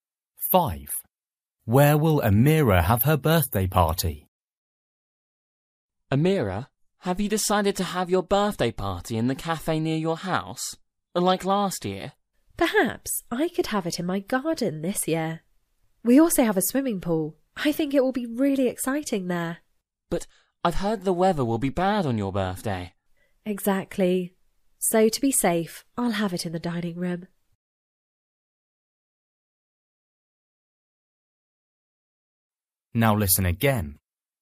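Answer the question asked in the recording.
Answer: In the dining room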